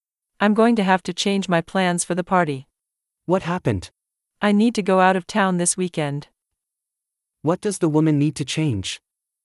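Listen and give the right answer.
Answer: Her plans for the party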